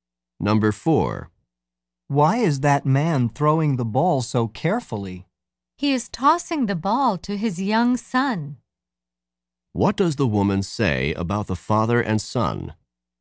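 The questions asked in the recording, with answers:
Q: What does the woman say about the father and son?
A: The father is gently tossing the ball to his young son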